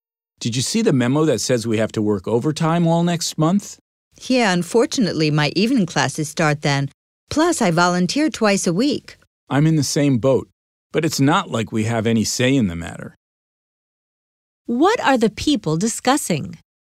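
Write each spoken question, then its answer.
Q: What are the people discussing?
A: Having to work overtime all next month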